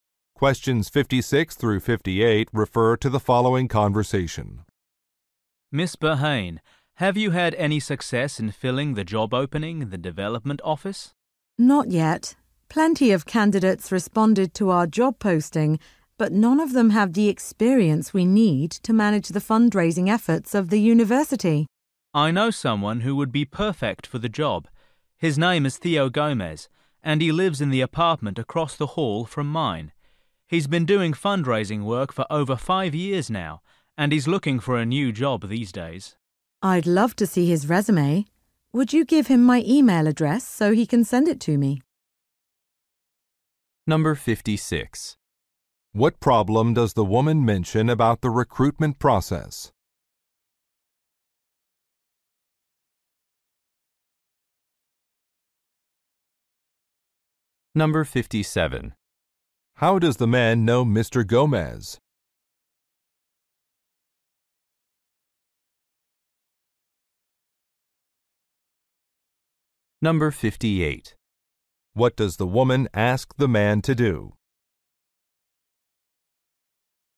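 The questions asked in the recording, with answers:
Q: What problem does the woman mention about the recruitment process?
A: The candidates lack the needed experience

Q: How does the man know Mr. Gomez?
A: They are neighbors

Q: What does the woman ask the man to do?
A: Give Mr. Gomez her email address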